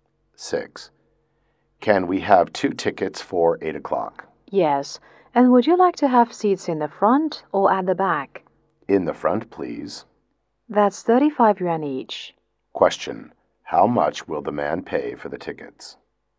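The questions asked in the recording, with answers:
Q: How much will the man pay for the tickets?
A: 70 yuan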